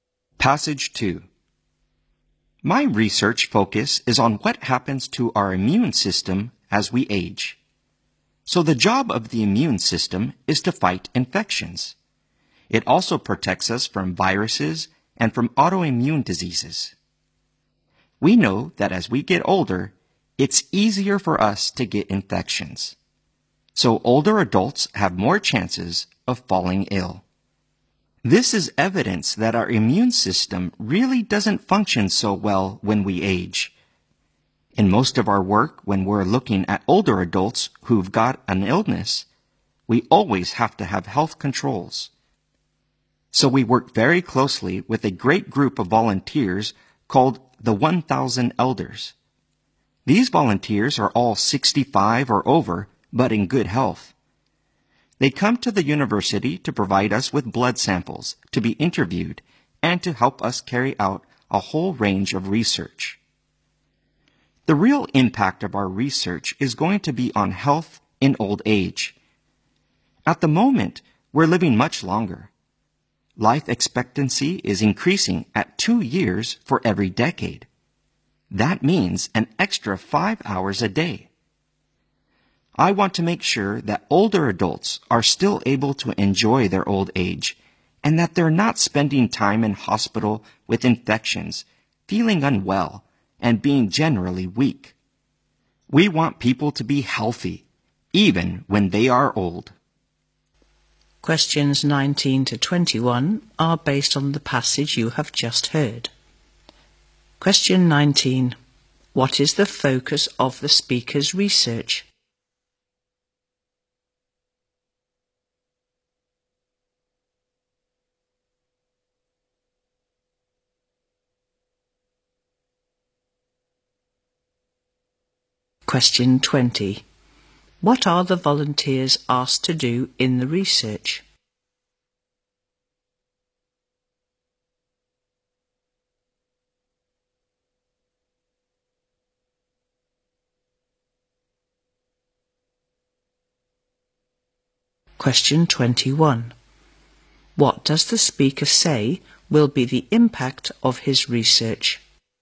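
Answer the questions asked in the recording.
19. What happens to our immune system as we age.
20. Give blood samples, be interviewed, and help with research.
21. It will improve people's health in old age.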